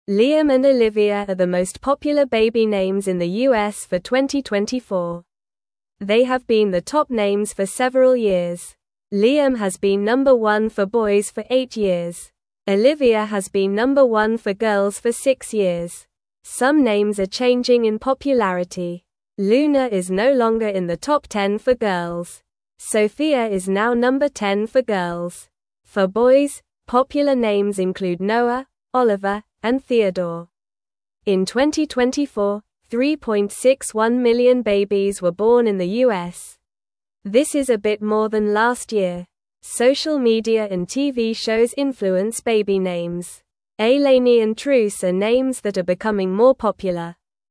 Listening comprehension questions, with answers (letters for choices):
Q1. (1)______ and (2)______ are the most popular baby names in the U.S. for 2024.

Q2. (1)______ and (2)______ are the most popular baby names in the U.S. for 2024.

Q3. They have been the top names for (3)______ years.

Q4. Some (4)______ are (5)______ in popularity.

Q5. Some (4)______ are (5)______ in popularity.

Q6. (6)______ is no longer in the top 10 for girls.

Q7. Sofia is now (7)______ 10 for girls.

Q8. For (8)______, (9)______ names include Noah, Oliver, and Theodore.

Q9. For (8)______, (9)______ names include Noah, Oliver, and Theodore.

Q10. This is a bit (10)______ than (11)______ year.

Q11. This is a bit (10)______ than (11)______ year.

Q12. Ailany and (12)______ are names that are becoming more popular.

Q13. What is one reason baby names change in popularity?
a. Weather changes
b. Social media and TV shows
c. School names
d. Animal names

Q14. Which name is no longer in the top 10 for girls?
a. Olivia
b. Sofia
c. Luna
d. Ailany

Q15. What are some popular names for boys mentioned in the article?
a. Noah, Oliver, and Theodore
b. Liam, Sofia, and Luna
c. Ailany, Truce, and Olivia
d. Liam, Noah, and Ailany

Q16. How many years has Olivia been the number one name for girls?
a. Eight years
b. Five years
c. Four years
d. Six years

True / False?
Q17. Olivia has not been the top girl name for six years.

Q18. Liam has been the top boy name for eight years.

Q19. Ailany and Truce are names that are not becoming more popular.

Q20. Luna is no longer one of the top 10 names for girls.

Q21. Liam is not a popular name for boys in the U.S. in 2024.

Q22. Sofia is not the 10th most popular name for girls.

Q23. Olivia is the most popular name for girls in the U.S. in 2024.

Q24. Some popular boy names are Noah, Oliver, and Theodore.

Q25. Can you name two popular names for boys besides Liam?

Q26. What influences the names that parents choose for their babies?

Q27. What are two names that are becoming more popular?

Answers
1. Liam
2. Olivia
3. several
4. names
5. changing
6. Luna
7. number
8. boys
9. popular
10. more
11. last
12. Truce
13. b
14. c
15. a
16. d
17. False
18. True
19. False
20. True
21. False
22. False
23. True
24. True
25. Noah and Oliver are two popular names for boys.
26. Social media and TV shows influence the names.
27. Ailany and Truce are becoming more popular.

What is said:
Liam and Olivia are the most popular baby names in the U.S. for 2024. They have been the top names for several years. Liam has been number one for boys for eight years. Olivia has been number one for girls for six years.
Some names are changing in popularity. Luna is no longer in the top 10 for girls. Sofia is now number 10 for girls. For boys, popular names include Noah, Oliver, and Theodore.
In 2024, 3.61 million babies were born in the U.S. This is a bit more than last year. Social media and TV shows influence baby names. Ailany and Truce are names that are becoming more popular.

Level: Level 2